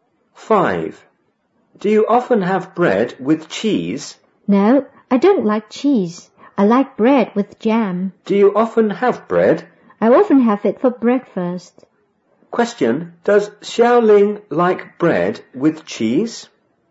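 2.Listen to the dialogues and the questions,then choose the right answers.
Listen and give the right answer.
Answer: No, she doesn't.

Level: 五年级下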